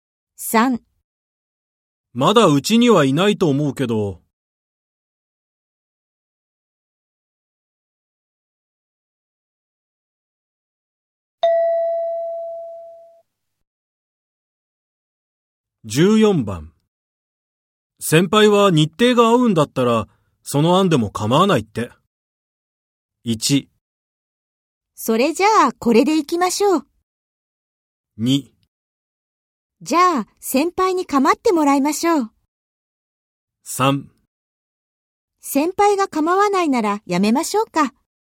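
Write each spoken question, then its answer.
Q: 先輩は日程が合うんだったら、その案でも構わないって。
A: 1: それじゃあ、これで行きましょう。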